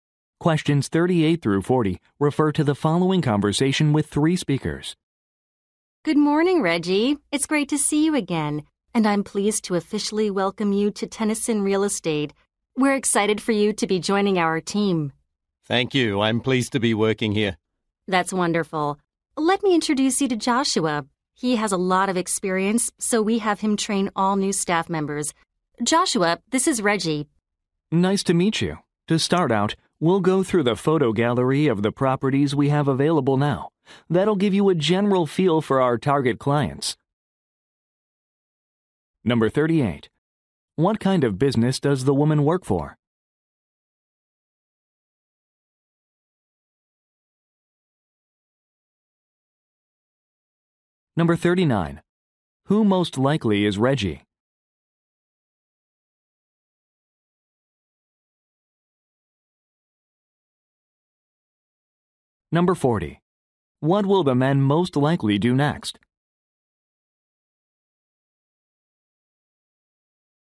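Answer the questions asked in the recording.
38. A real estate agency
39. A new employee
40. Look through a photo gallery of available properties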